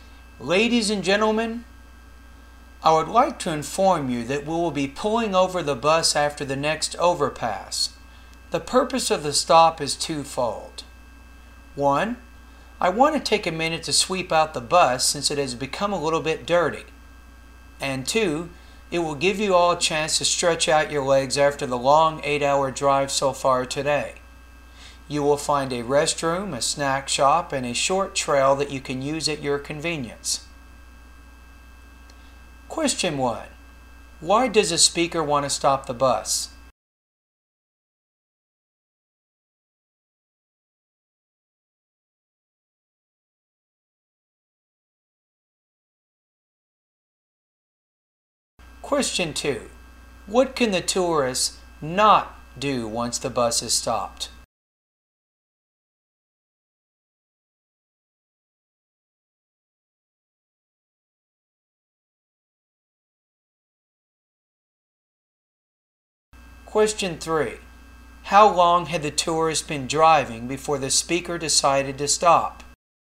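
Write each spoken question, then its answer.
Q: Why does a speaker want to stop the bus?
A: To clean (sweep out) the bus and let passengers stretch their legs

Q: How long had the tourist been driving before the speaker decided to stop?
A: 8 hours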